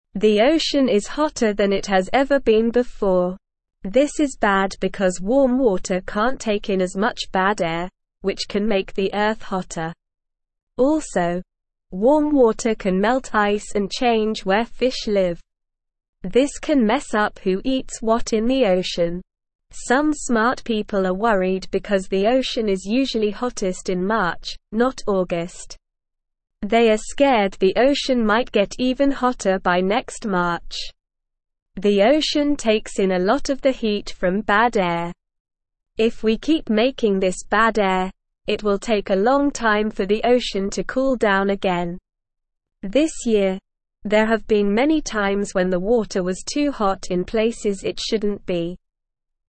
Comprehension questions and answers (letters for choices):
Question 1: The ocean is (1)______ than it has ever been before.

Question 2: This is bad because warm water can't take in as much bad air, which can (2)______ the earth hotter.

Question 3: Also, warm water can (3)______ ice and change where fish live.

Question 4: Some smart (4)______ are worried because the ocean is usually hottest in March, not August.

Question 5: If we (5)______ (6)______ this bad air, it will take a long time for the ocean to (7)______ down again.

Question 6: If we (5)______ (6)______ this bad air, it will take a long time for the ocean to (7)______ down again.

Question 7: If we (5)______ (6)______ this bad air, it will take a long time for the ocean to (7)______ down again.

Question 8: This (8)______, there have been many times when the water was too hot in places it shouldn't be.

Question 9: This can cause problems for who eats what in the ocean.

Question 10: Warm water can melt ice and change where fish live.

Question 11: Smart people are not worried because the ocean is usually hottest in March, not August.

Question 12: It will take a short time for the ocean to cool down if we keep making bad air.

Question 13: Hot water can't take in bad air very well.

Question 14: The ocean releases a lot of heat from bad air.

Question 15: They are hopeful the ocean might get even hotter by next March.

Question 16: The ocean is very hot right now.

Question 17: Why is it bad if the ocean is hotter?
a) Warm water can't take in as much bad air.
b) Warm water can make the earth colder.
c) Warm water can freeze ice.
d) Warm water can make fish happier.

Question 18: What can warm water do to ice?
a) Freeze it.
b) Make it colder.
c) Make it disappear.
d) Melt it.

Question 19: What does the ocean take in a lot of from bad air?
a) Heat.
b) Cold.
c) Ice.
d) Fish.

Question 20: What might happen if we keep making bad air?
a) The ocean will get colder quickly.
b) The ocean will freeze.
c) The ocean will take a long time to cool down.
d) The ocean will disappear.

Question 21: When has the water been too hot in places it shouldn't be?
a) Last year.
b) This year.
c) Next year.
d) In the future.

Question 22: What can warm water do to where fish live?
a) Make it colder.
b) Make it disappear.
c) Change it.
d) Make it happier.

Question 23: What can happen if fish can't live where they used to?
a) It can make the ocean colder.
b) It can make the ocean disappear.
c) It can make the ocean happier.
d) It can mess up who eats what in the ocean.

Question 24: Why is it bad if the ocean is hot?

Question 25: What can happen if warm water melts ice?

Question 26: Why is it taking a long time for the ocean to cool down?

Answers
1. hotter
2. make
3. melt
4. people
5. keep
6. making
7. cool
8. year
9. True
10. True
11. False
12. False
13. True
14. False
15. False
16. True
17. a
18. d
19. a
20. c
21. b
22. c
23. d
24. It's bad because hot water can make the earth hotter and can't take in as much bad air.
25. If warm water melts ice, it can change where fish live and mess up who eats what in the ocean.
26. It's taking a long time for the ocean to cool down because we keep making bad air

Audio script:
The ocean is hotter than it has ever been before. This is bad because warm water can't take in as much bad air, which can make the earth hotter. Also, warm water can melt ice and change where fish live. This can mess up who eats what in the ocean.
Some smart people are worried because the ocean is usually hottest in March, not August. They are scared the ocean might get even hotter by next March. The ocean takes in a lot of the heat from bad air. If we keep making this bad air, it will take a long time for the ocean to cool down again. This year, there have been many times when the water was too hot in places it shouldn't be.

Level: Level 1